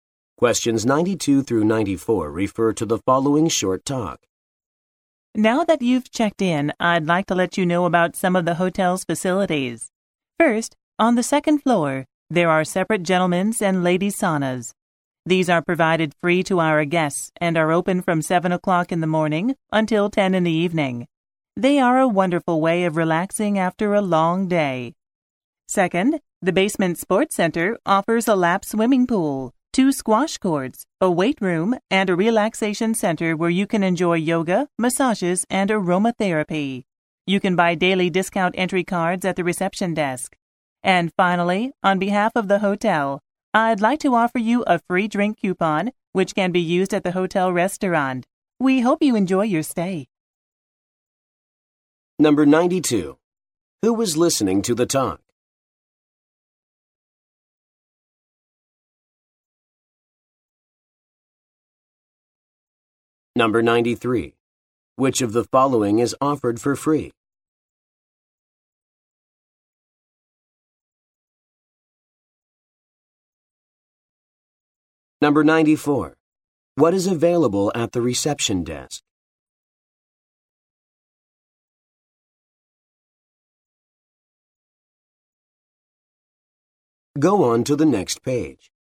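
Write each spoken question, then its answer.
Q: Who was listening to the talk?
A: Hotel guests

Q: What is available at the reception desk?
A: Daily discount entry cards for the sports center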